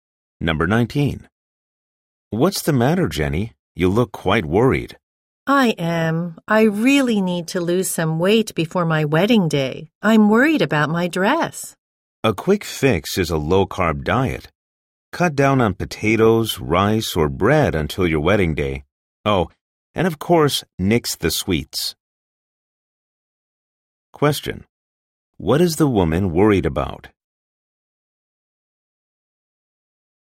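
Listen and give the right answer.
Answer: Fitting into her wedding dress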